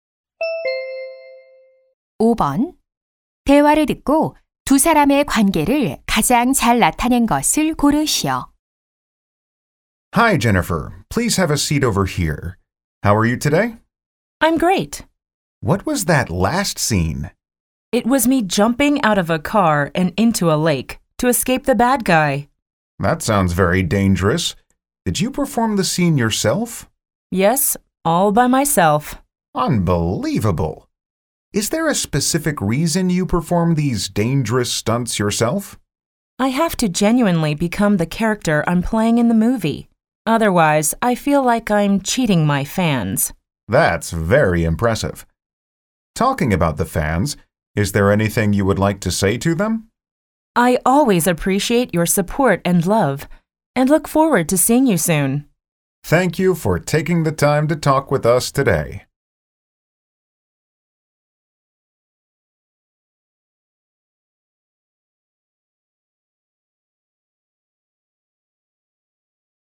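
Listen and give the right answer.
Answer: 인터뷰 진행자 - 영화배우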